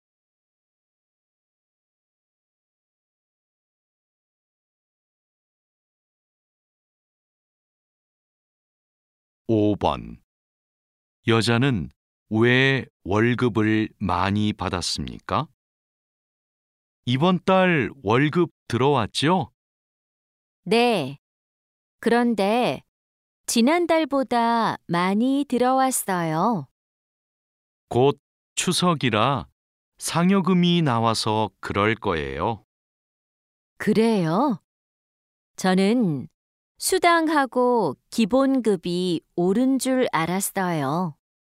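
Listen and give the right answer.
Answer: 추석 상여금이 나와서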